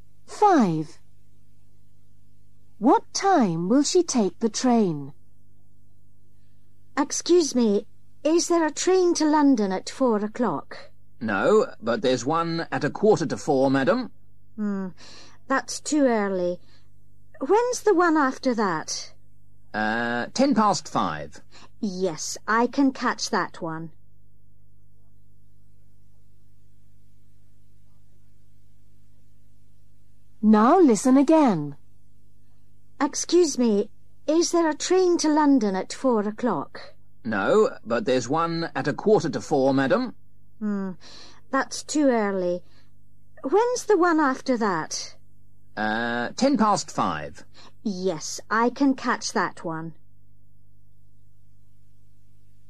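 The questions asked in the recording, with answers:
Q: What time will she take the train?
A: 5:10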